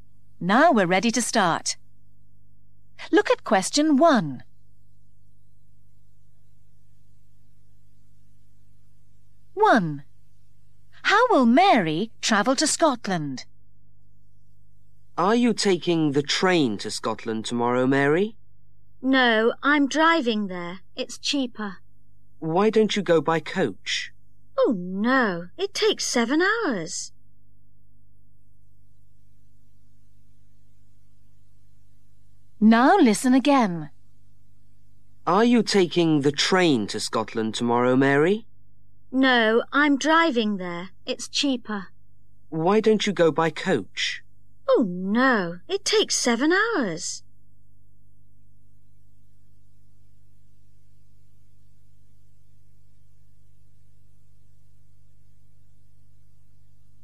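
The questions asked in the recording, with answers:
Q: How will Mary travel to Scotland?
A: by car (driving)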